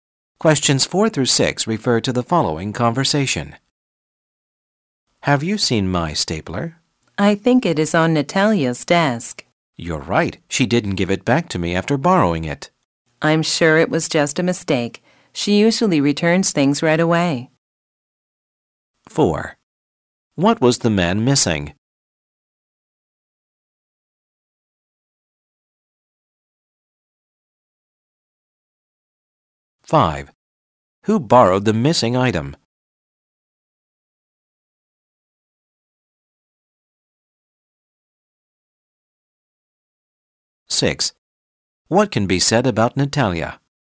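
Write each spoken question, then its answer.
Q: What was the man missing?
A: His stapler

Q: Who borrowed the missing item?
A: Natalia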